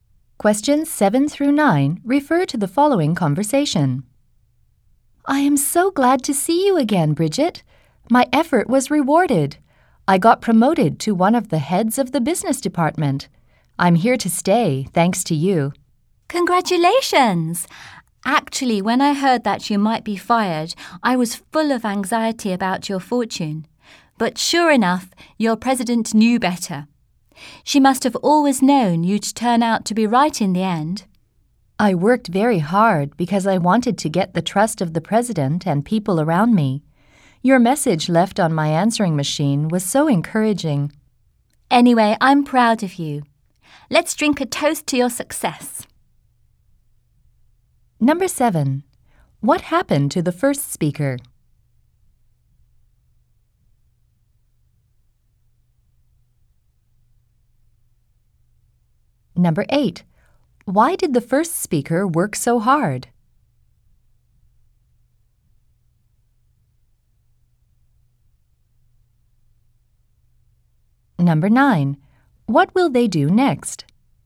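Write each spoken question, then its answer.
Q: What happened to the first speaker?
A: The speaker was promoted to one of the heads of the business department.

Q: Why did the first speaker work so hard?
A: To get the trust of the president and the people around them.

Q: What will they do next?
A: Drink a toast to the speaker's success.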